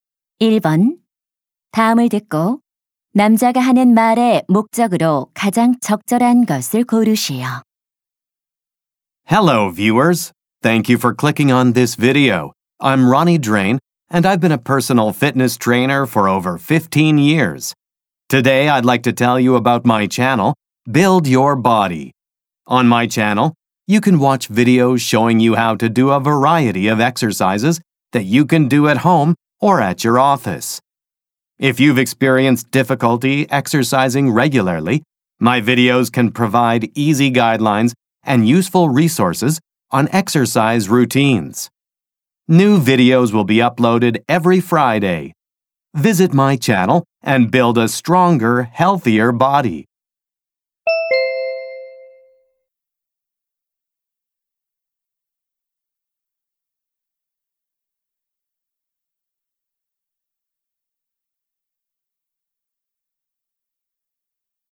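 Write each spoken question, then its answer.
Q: 다음을 듣고 남자가 하는 말의 목적으로 가장 적절한 것을 고르시오.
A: 자신의 운동 채널(Build Your Body)을 홍보하려고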